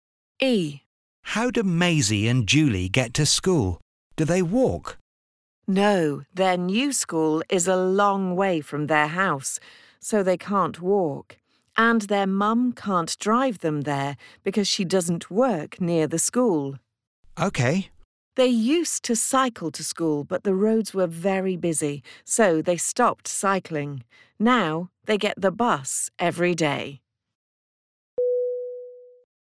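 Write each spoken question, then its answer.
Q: How do Maisie and Julie get to school?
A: By bus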